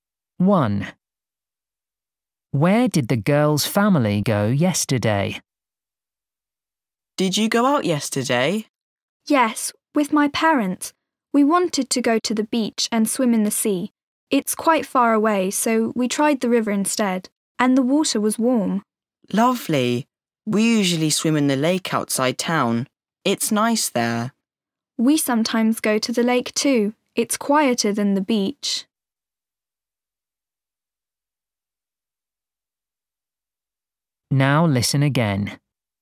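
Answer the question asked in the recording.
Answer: to the river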